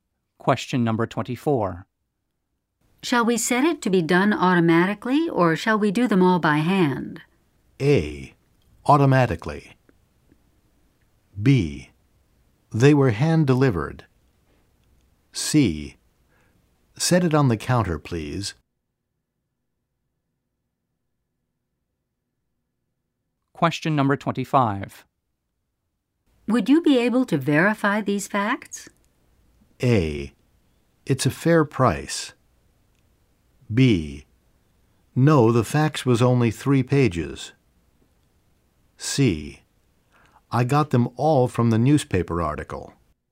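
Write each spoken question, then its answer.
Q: Shall we set it to be done automatically, or shall we do them all by hand?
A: A: Automatically.

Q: Would you be able to verify these facts?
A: C: I got them all from the newspaper article.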